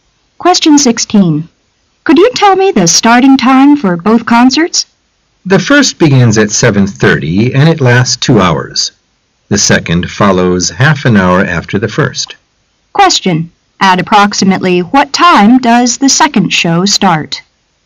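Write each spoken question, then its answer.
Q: At approximately what time does the second show start?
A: At about 10:00

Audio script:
[解析] W: Could you tell me the starting time for both concerts? M: The first begins at 7:30 and it lasts 2 hours. The second follows half an hour after the first. Q: At approximately what time does the second show start?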